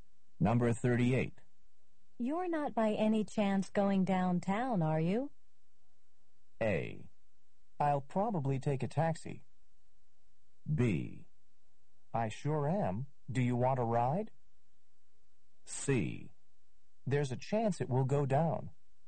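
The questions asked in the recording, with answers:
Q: You're not by any chance going downtown, are you?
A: B: I sure am. Do you want a ride?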